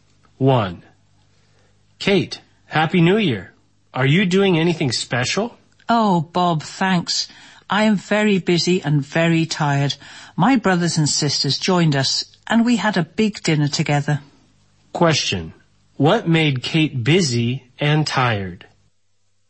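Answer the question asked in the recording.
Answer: A big family dinner for the New Year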